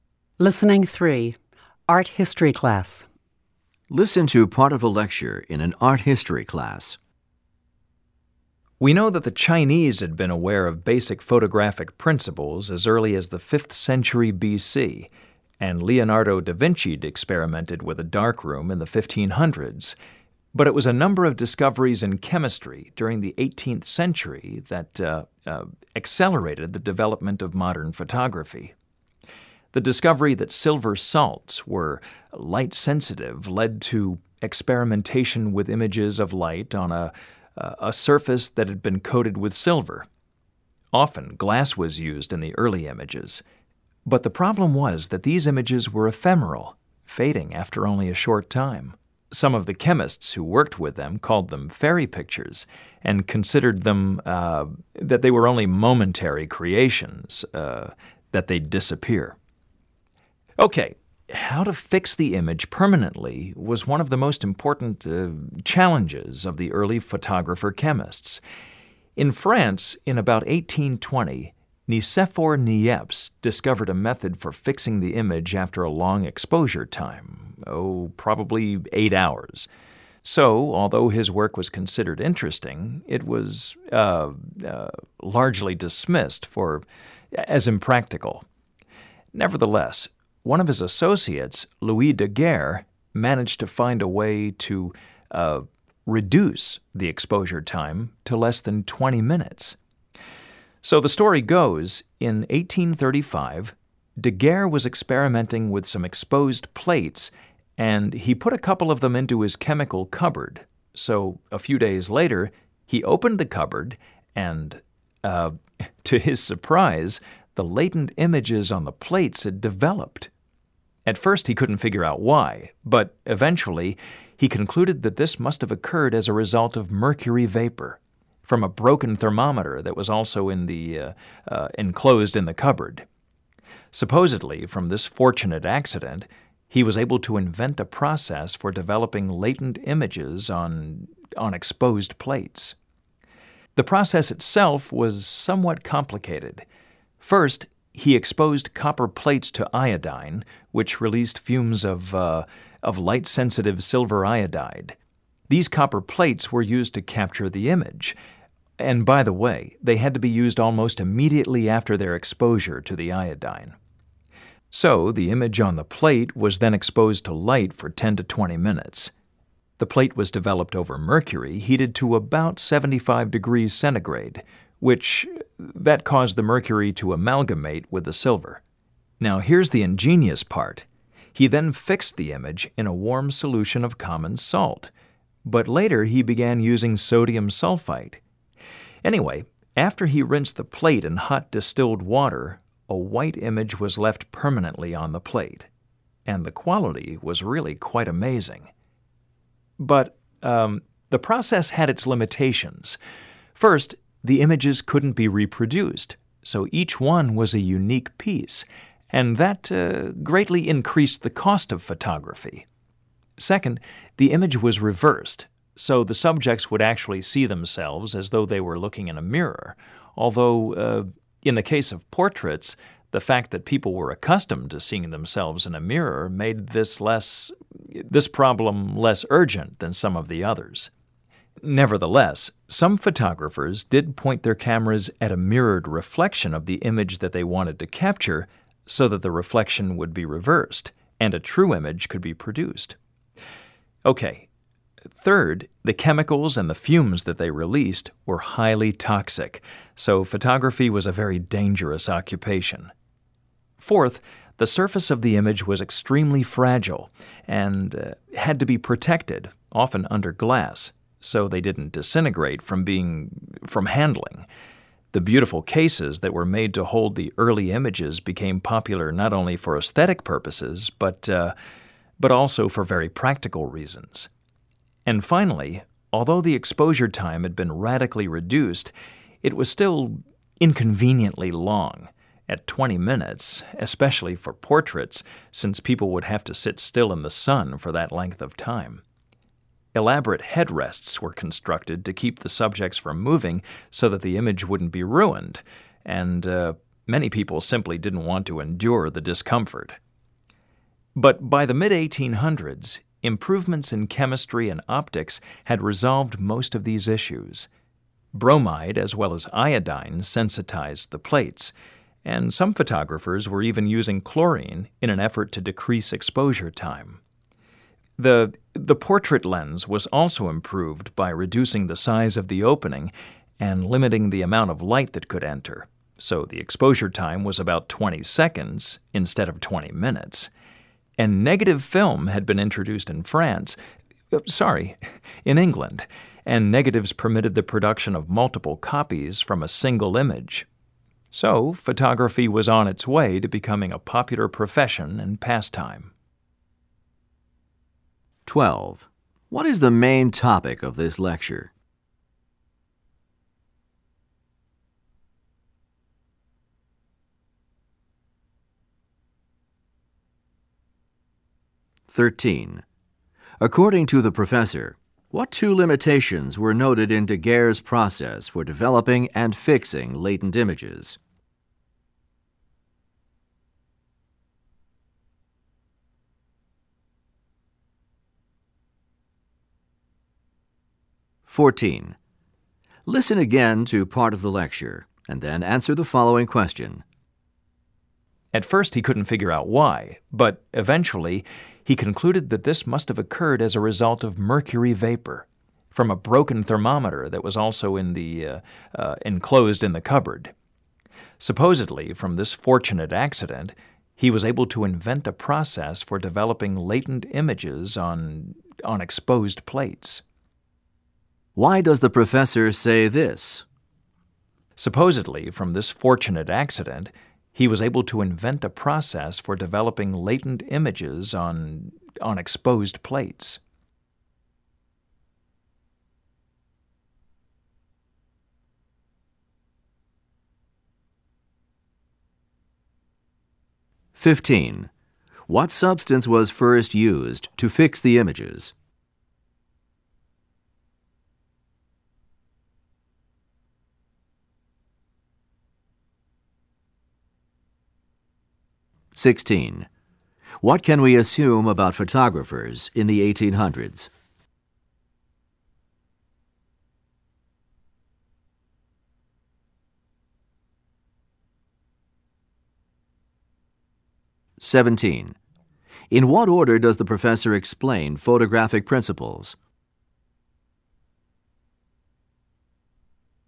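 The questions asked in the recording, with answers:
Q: What is the main topic of this lecture?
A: The early development of photography, especially Daguerre's process

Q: What substance was first used to fix the images?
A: Common salt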